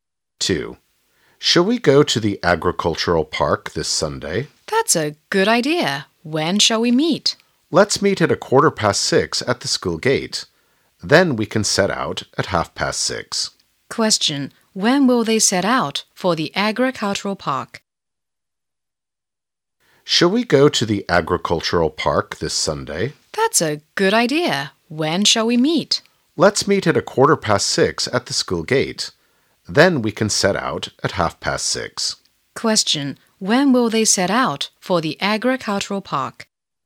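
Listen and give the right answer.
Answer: At 6:30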